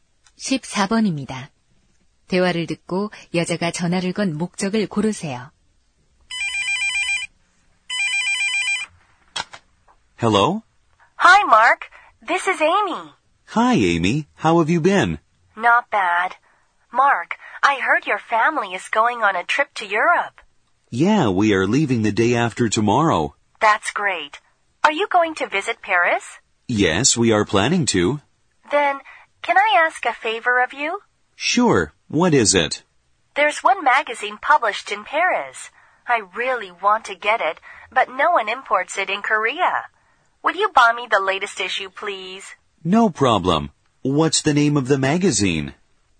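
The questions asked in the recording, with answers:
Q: 대화를 듣고 여자가 전화를 건 목적을 고르세요.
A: 파리에서 잡지 구입을 부탁하려고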